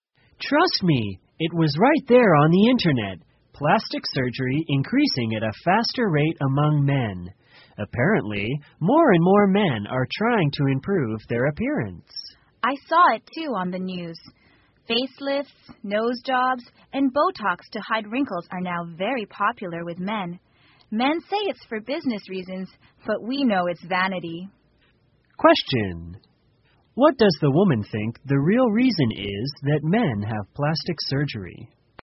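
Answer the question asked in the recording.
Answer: Vanity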